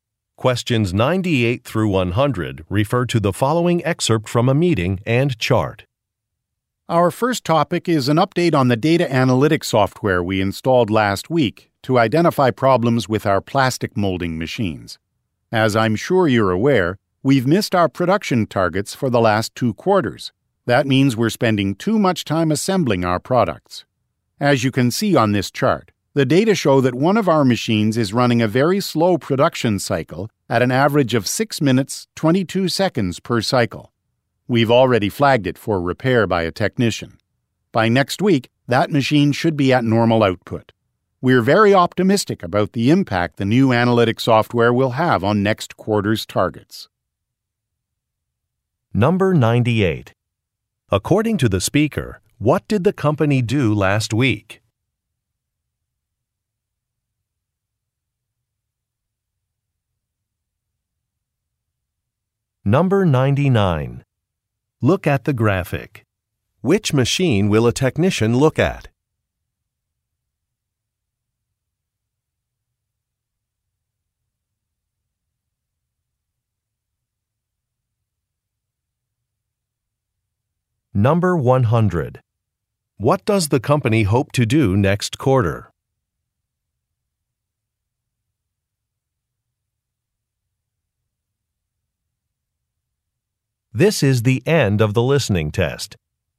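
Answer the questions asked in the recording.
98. Installed data analytics software
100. Meet its production targets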